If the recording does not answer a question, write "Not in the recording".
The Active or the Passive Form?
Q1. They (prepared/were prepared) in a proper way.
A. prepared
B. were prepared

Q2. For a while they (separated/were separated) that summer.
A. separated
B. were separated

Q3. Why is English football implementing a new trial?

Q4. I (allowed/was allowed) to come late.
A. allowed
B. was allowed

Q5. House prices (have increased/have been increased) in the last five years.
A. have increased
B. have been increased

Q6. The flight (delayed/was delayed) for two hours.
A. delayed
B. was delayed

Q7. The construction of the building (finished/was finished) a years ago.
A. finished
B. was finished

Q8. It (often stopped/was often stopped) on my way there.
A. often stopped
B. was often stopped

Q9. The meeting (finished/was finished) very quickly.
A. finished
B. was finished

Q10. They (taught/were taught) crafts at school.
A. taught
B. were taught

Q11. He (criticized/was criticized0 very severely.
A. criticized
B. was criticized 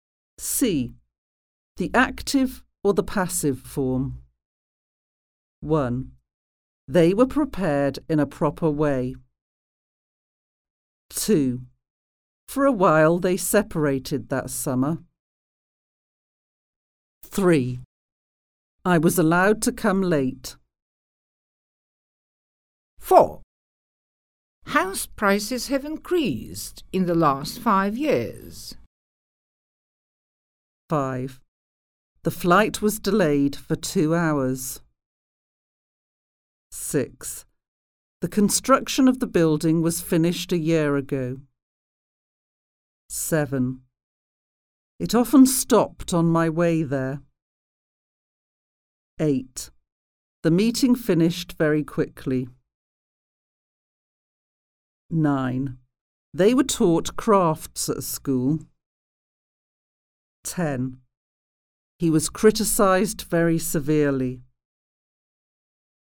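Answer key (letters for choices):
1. B
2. A
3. Not in the recording
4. B
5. A
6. B
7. B
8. A
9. A
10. B
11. B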